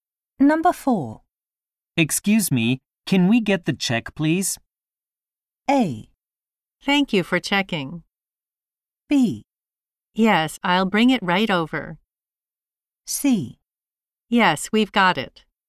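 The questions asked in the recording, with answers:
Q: Excuse me, can we get the check, please?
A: B: Yes, I'll bring it right over.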